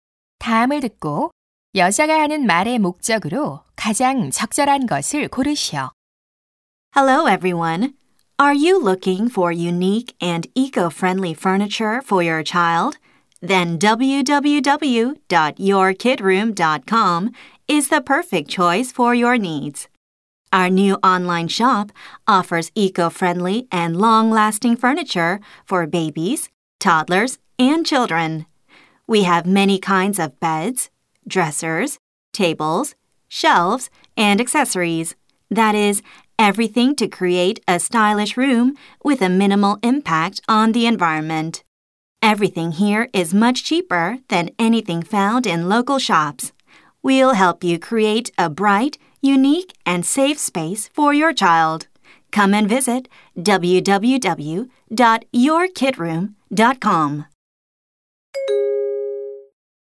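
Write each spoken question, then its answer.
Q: 다음을 듣고 여자가 하는 말의 목적으로 가장 적절한 것을 고르시오.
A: 친환경 아동 가구 온라인 쇼핑몰을 홍보하려고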